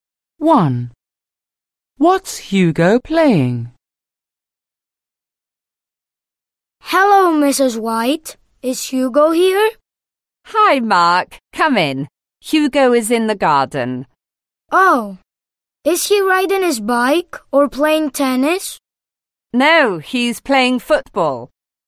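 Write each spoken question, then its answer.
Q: What's Hugo playing?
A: Football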